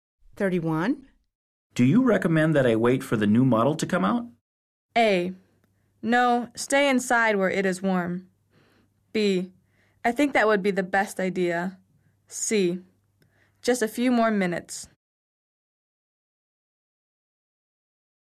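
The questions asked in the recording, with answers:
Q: Do you recommend that I wait for the new model to come out?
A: B: I think that would be the best idea.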